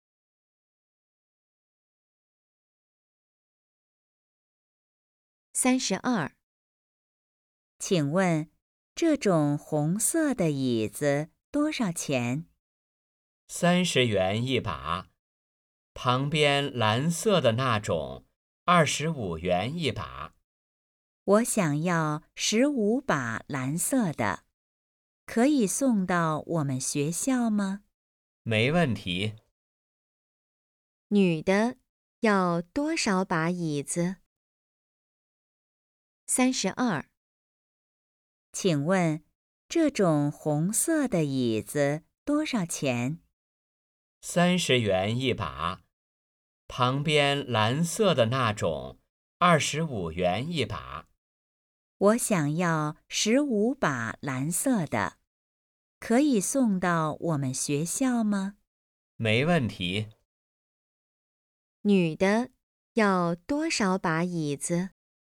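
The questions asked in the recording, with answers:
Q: 女的要多少把椅子?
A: 15把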